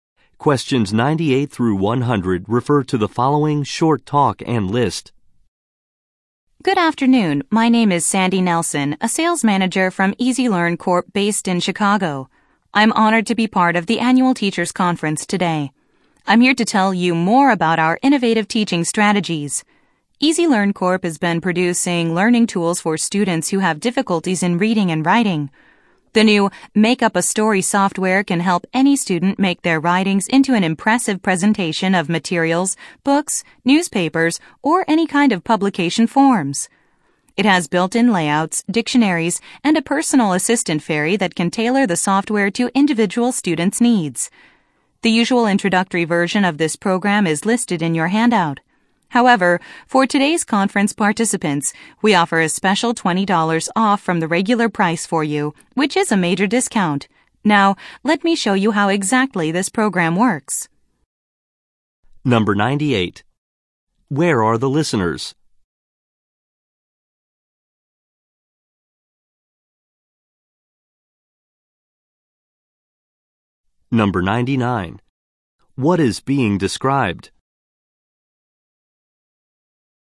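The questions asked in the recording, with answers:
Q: Where are the listeners?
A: At an annual teachers' conference

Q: What is being described?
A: Make Up a Story learning software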